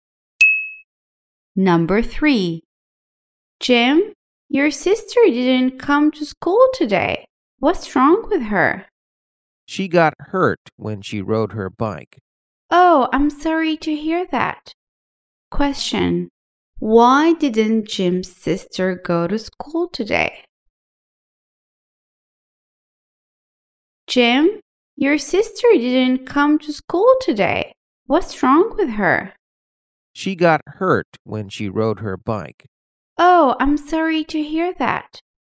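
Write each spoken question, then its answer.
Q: Question, why didn't Jim's sister go to school today?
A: She got hurt when riding her bike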